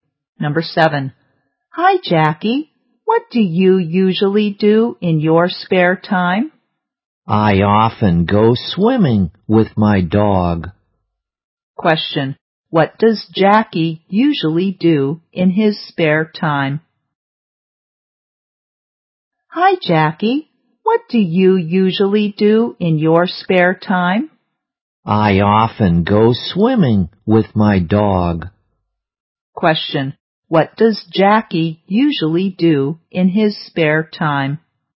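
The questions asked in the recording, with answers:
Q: What does Jackie usually do in his spare time?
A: Goes swimming with his dog.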